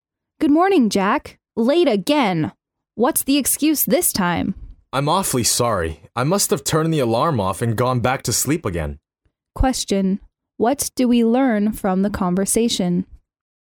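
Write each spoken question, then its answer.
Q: What do we learn from the conversation?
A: Jack is late again because he overslept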